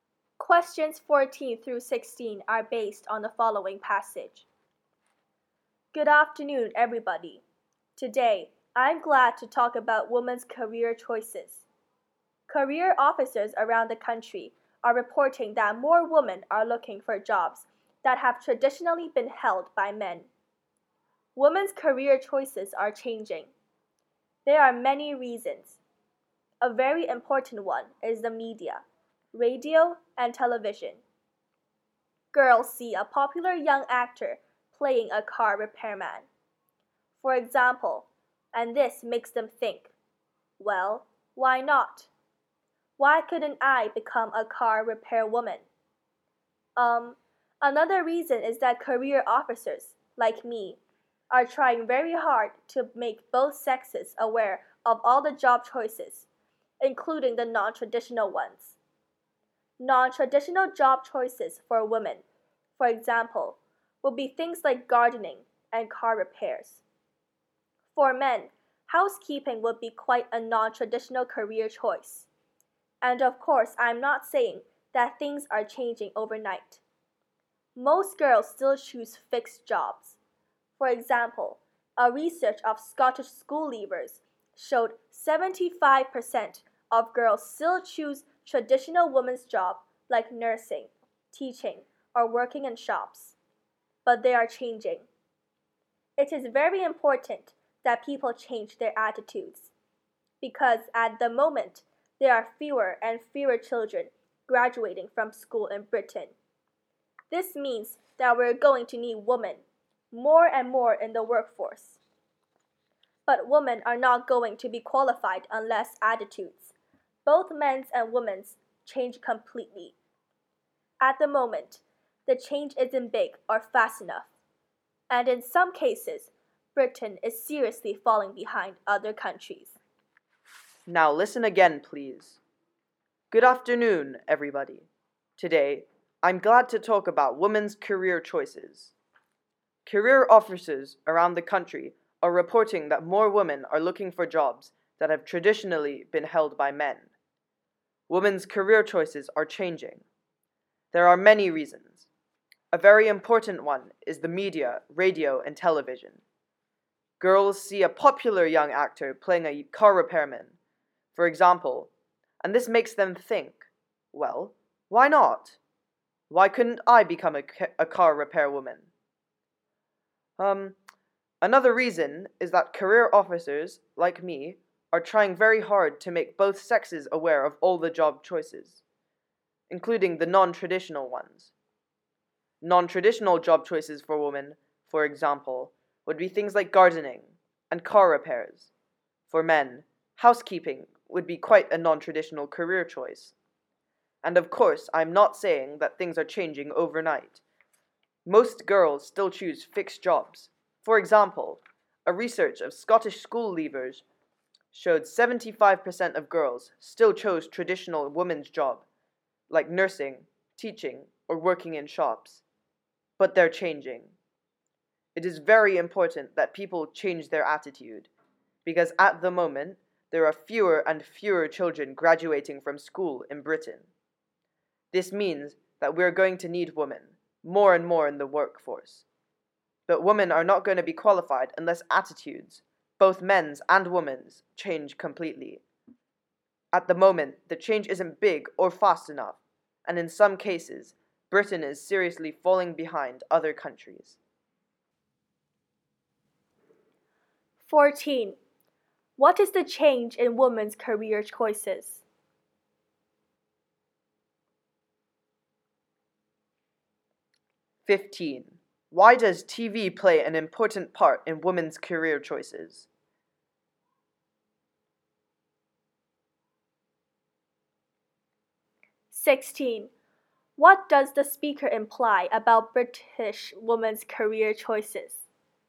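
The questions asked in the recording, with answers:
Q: What is the change in women's career choices?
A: More women are looking for jobs traditionally held by men

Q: Why does TV play an important part in women's career choices?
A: Seeing actors in non-traditional jobs makes girls think they could do those jobs too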